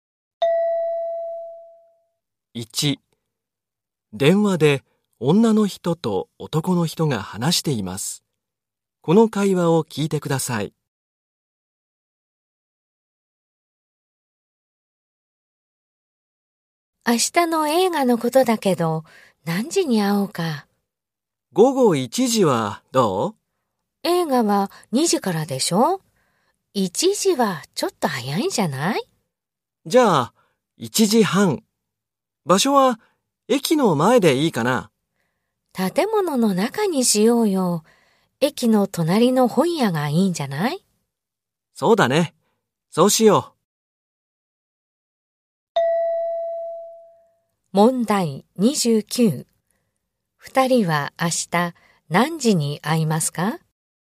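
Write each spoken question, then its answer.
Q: 二人は明日何時に会いますか?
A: 1時半

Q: 二人は明日どこで会いますか?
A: 駅の隣の本屋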